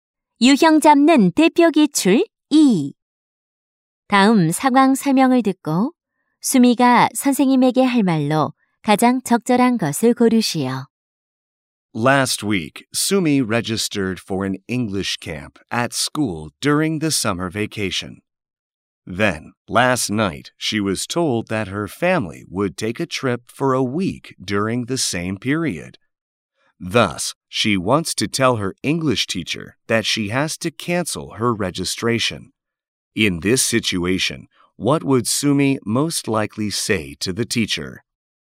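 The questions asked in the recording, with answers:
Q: In this situation, what would Sumi most likely say to the teacher?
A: I'm sorry, but I have to cancel my registration for the English camp.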